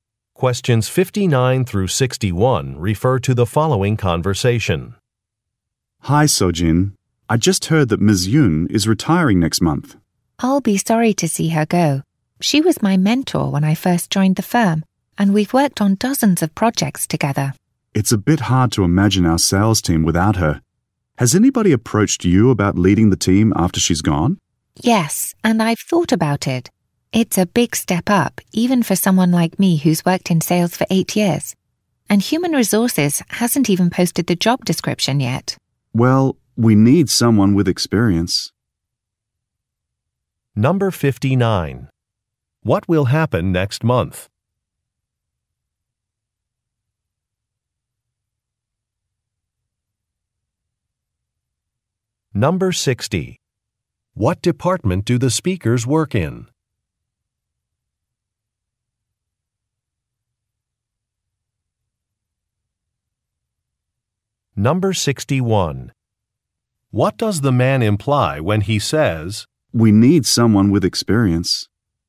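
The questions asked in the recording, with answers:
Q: What will happen next month?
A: Ms. Yoon will retire

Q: What department do the speakers work in?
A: Sales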